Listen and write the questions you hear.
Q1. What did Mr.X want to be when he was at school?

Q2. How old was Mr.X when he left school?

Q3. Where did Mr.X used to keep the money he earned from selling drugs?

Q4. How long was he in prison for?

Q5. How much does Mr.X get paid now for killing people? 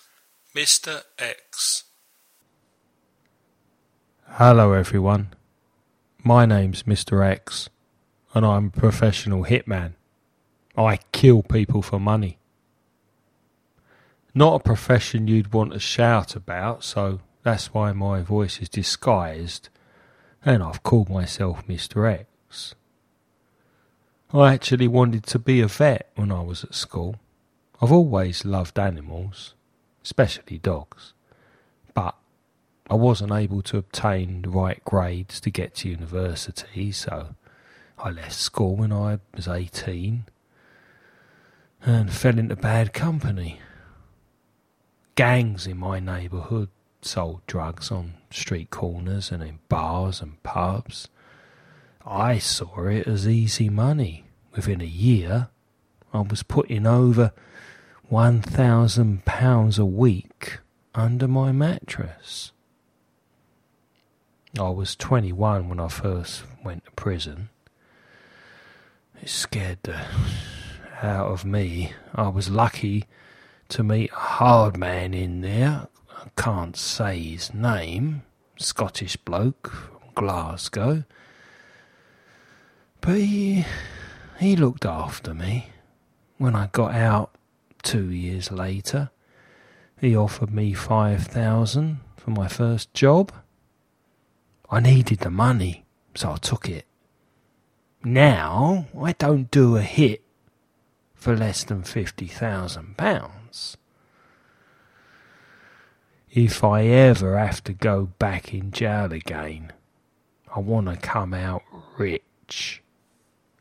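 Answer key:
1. A vet
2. 18
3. Under his mattress
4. 2 years
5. At least £50,000

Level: nivel intermedio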